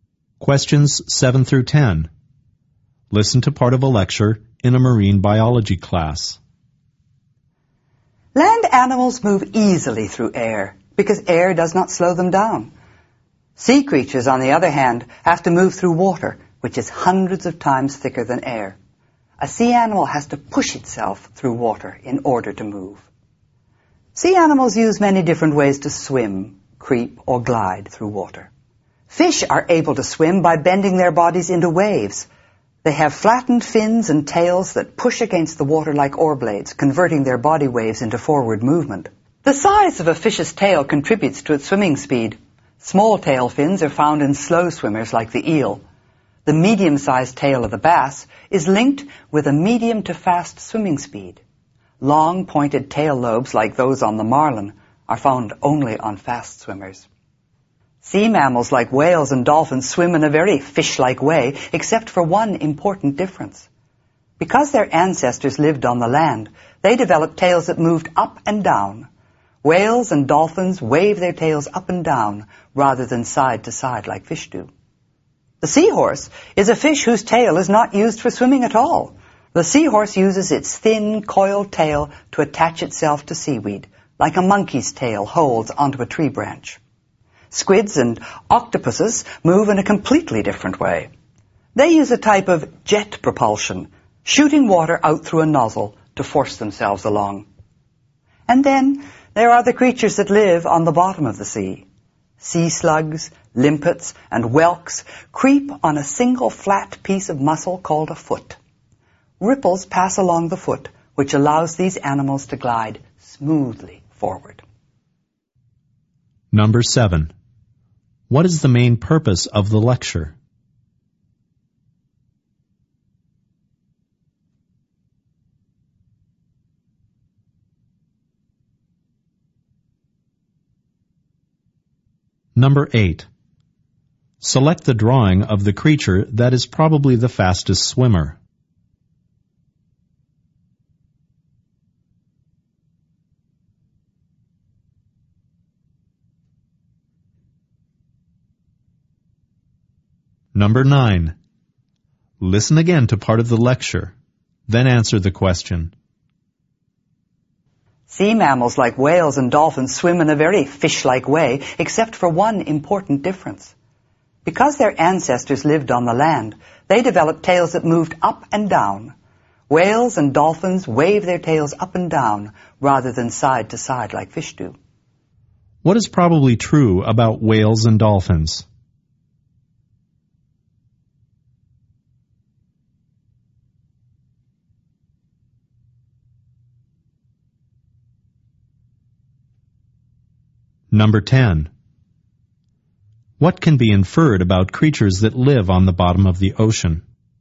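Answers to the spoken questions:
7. To explain the different ways sea animals move through water
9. Their ancestors lived on land, so their tails move up and down
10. They move by creeping on a single muscular foot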